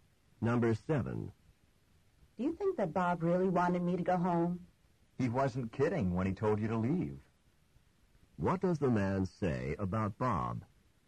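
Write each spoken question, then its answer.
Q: What does the man say about Bob?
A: Bob was serious about wanting her to leave.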